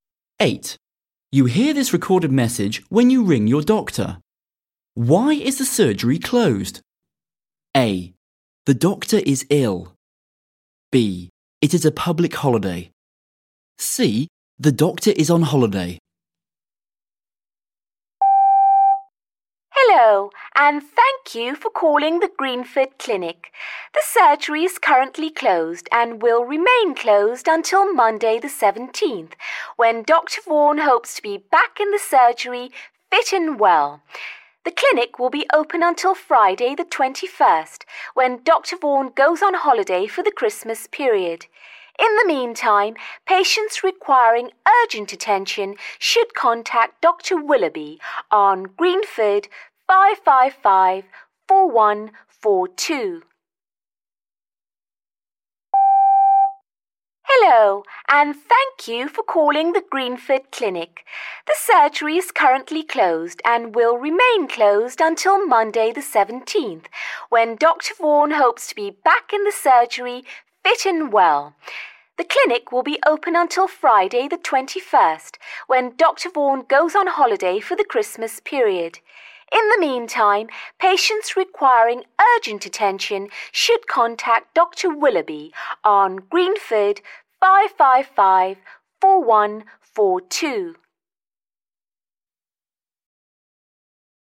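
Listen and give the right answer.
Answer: A: The doctor is ill.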